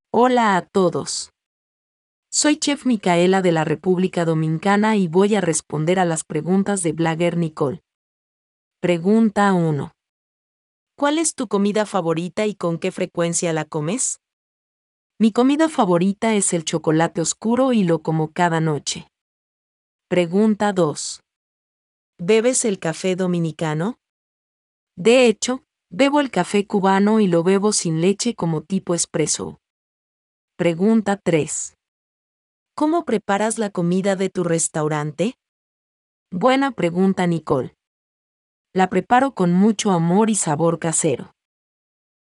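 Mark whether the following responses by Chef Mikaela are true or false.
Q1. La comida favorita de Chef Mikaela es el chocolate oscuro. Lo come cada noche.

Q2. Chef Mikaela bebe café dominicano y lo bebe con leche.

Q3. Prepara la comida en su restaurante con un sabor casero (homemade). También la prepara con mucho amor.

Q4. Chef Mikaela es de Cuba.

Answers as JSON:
{"1": "C", "2": "F", "3": "C", "4": "F"}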